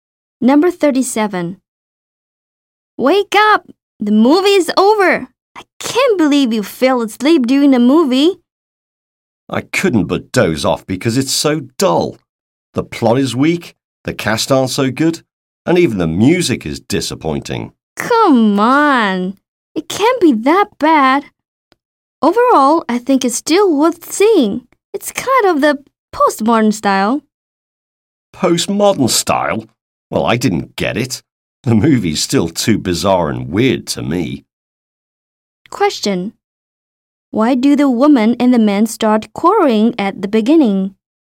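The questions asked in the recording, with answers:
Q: Why do the woman and the man start quarreling at the beginning?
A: One of them fell asleep during the movie.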